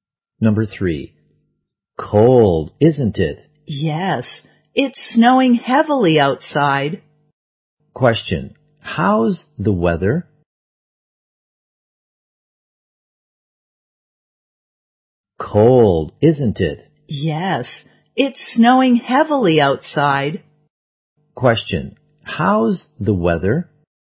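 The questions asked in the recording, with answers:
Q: how's the weather?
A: Cold and snowing heavily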